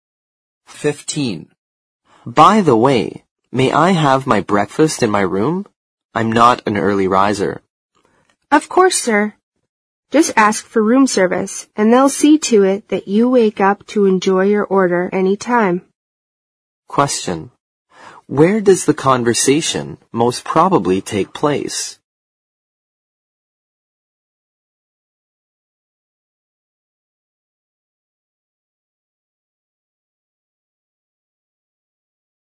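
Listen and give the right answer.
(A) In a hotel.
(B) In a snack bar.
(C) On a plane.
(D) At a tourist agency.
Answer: (A) In a hotel.

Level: 四级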